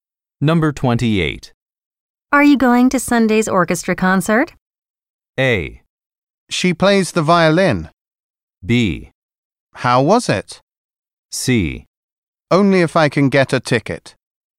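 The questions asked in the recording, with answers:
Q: Are you going to Sunday's orchestra concert?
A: C: Only if I can get a ticket.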